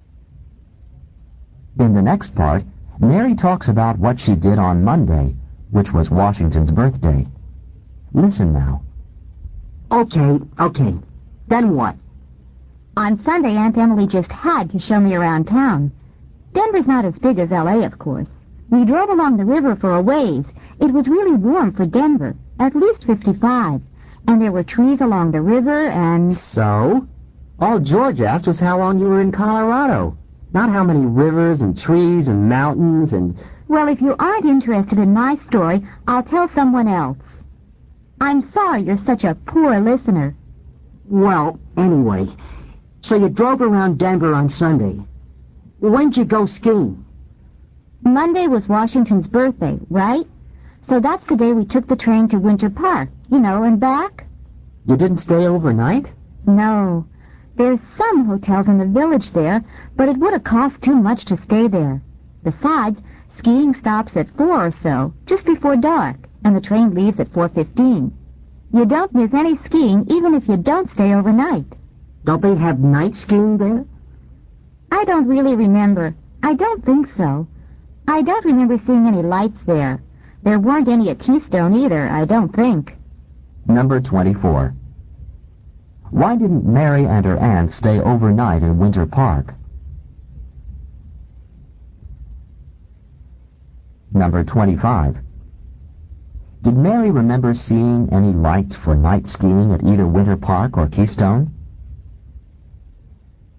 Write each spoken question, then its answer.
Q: Why didn't Mary and her aunt stay overnight in Winter Park?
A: it would have cost too much.

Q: Did Mary remember seeing any lights for night skiing at either Winter Park or Keystone?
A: the correct answer is B. No, she didn't.